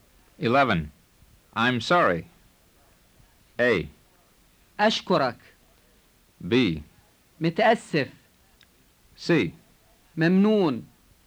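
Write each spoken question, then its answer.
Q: I'm sorry.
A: B: متأسف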